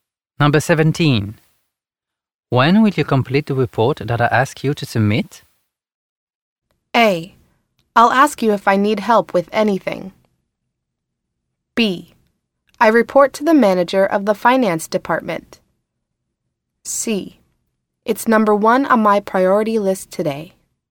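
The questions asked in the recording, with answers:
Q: When will you complete the report that I ask you to submit?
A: C: It's number one on my priority list today.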